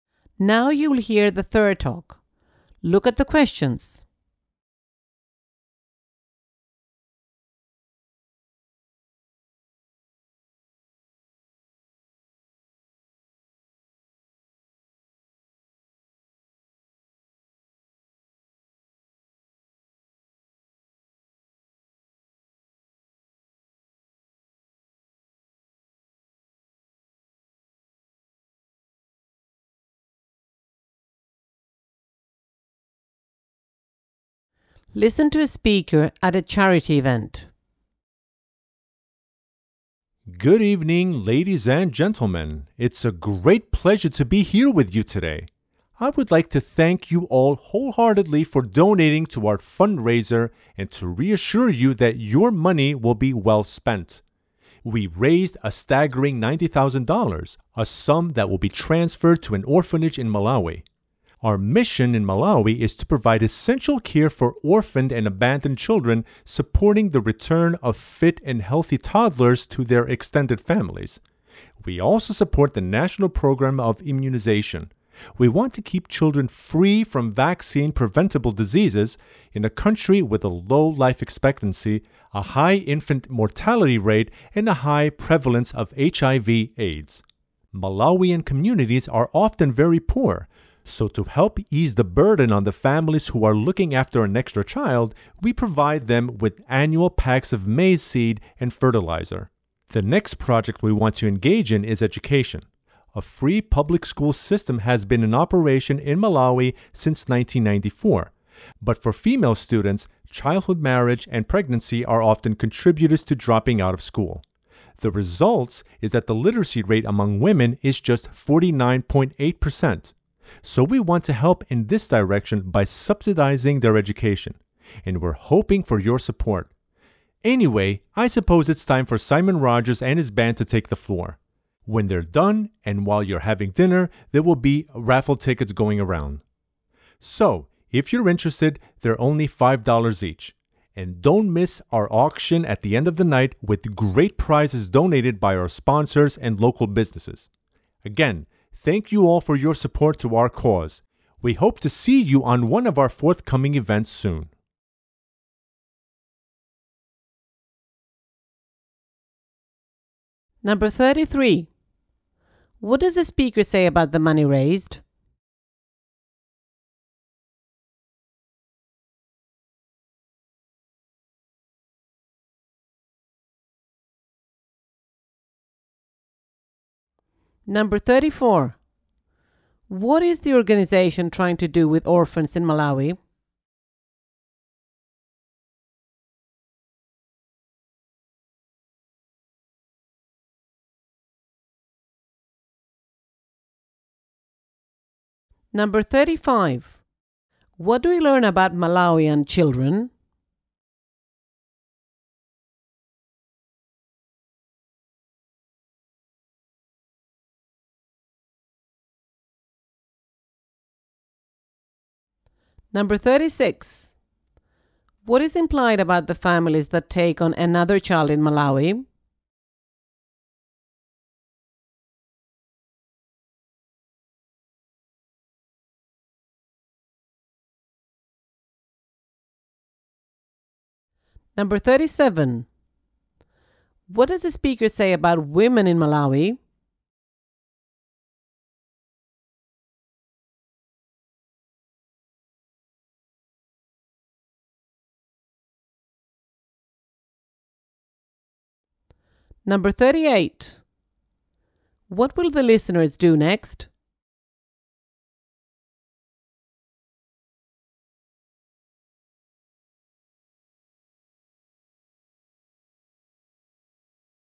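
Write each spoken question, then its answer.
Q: What does the speaker say about the money raised?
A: It was $90,000 and will go to an orphanage in Malawi

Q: What is the organization trying to do with orphans in Malawi?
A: Return healthy toddlers to their extended families

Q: What is implied about the families that take on another child in Malawi?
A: They are often poor and the extra child is a burden

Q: What does the speaker say about women in Malawi?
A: Their literacy rate is only 49.8%

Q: What will the listeners do next?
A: Listen to Simon Rogers and his band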